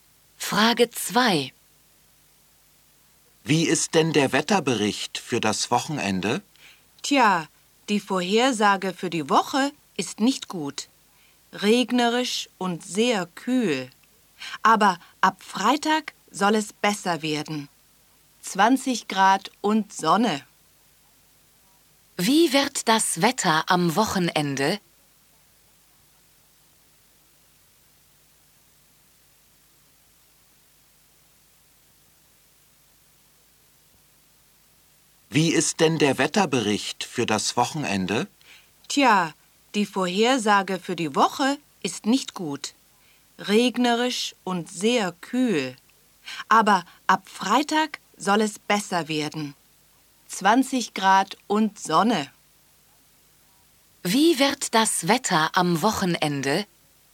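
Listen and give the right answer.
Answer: Sonnig, 20 Grad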